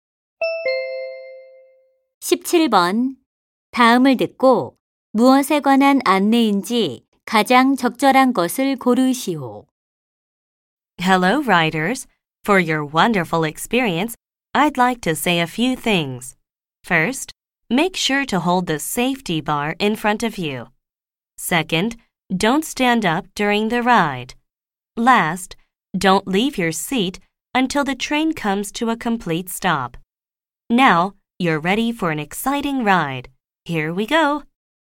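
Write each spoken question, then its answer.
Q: 다음을 듣고 무엇에 관한 안내인지 가장 적절한 것을 고르시오.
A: 놀이기구 탑승 시 안전 수칙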